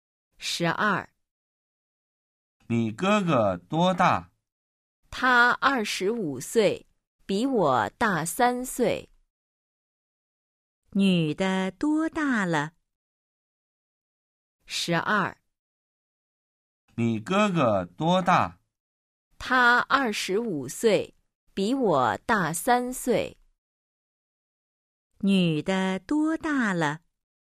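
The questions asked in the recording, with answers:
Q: 女的多大了?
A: 22岁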